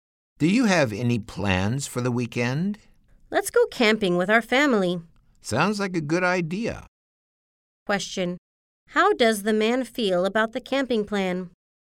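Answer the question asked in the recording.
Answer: He thinks it's a good idea.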